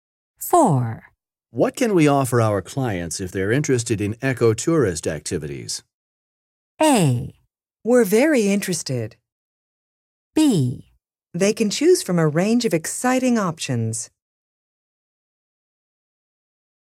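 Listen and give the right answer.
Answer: B: They can choose from a range of exciting options.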